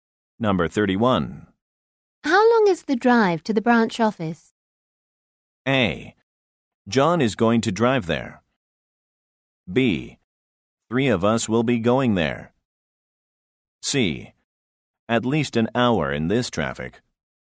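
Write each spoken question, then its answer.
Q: How long is the drive to the branch office?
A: C: At least an hour in this traffic.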